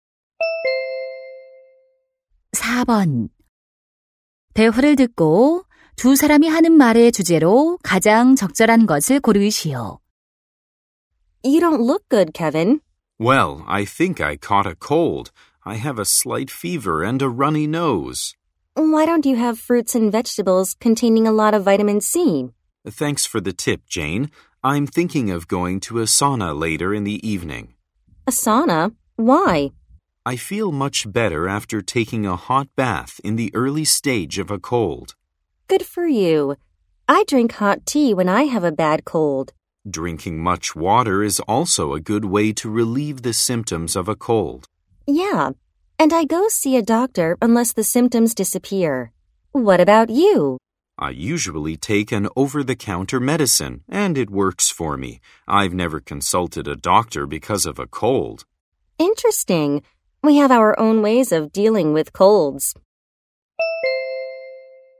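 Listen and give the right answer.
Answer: 감기에 대처하는 각자의 방법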